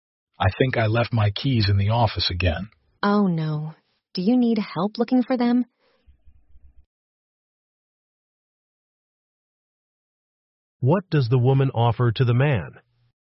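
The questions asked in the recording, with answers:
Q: What does the woman offer to the man?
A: To help look for his keys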